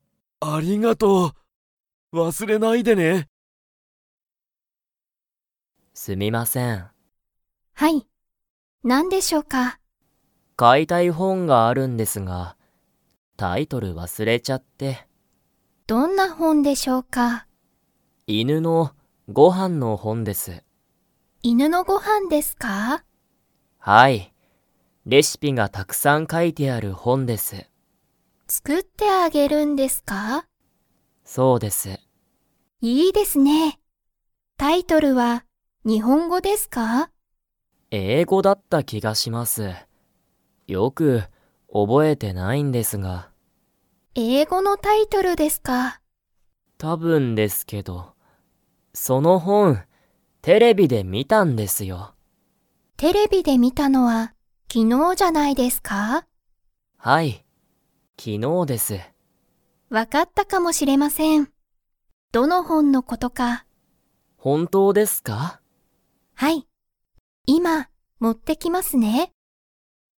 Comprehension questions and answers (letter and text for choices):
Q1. ナオキは、その本ほんのタイトルを知しっていますか?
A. はい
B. いいえ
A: B. いいえ

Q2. ナオキは、____のご飯はんの本ほんを買かいたい。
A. 犬いぬ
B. 今日きょう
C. 本当ほんとう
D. 英語えいご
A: A. 犬いぬ

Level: Level 2